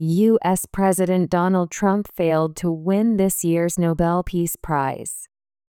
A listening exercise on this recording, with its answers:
US President Donald Trump ( ).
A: failed to win this year's Nobel Peace Prize

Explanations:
綴りが似た単語なので注意が必要です。発音も「Nobel /noʊˈbel/」と「Novel /ˈnɑː.vəl/」をしっかり区別しておきましょう。

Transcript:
US President Donald Trump failed to win this year's Nobel Peace Prize.

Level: 中級脱出